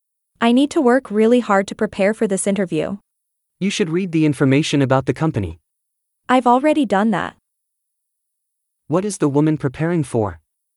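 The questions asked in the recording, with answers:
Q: What is the woman preparing for?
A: An interview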